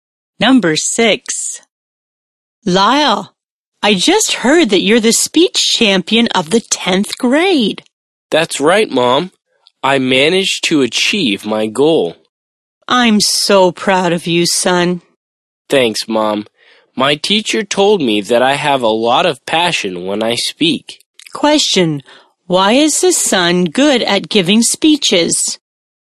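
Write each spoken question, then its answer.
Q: Question, why is the son good at giving speeches?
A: He has a lot of passion when he speaks.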